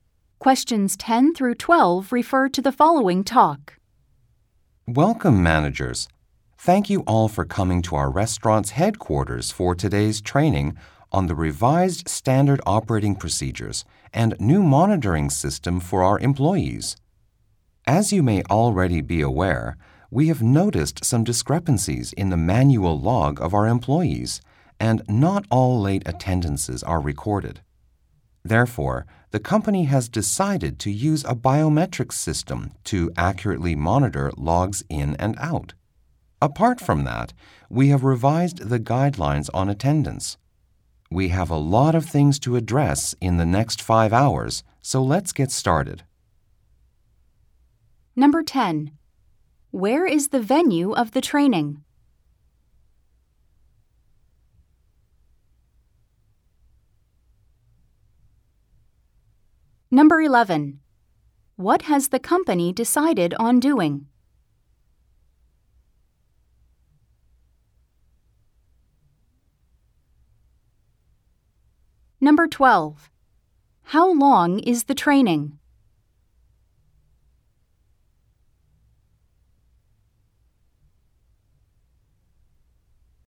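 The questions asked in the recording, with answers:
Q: Where is the venue of the training?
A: At the restaurant's headquarters

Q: What has the company decided on doing?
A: Using a biometric system to monitor employees' logs in and out

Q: How long is the training?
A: 5 hours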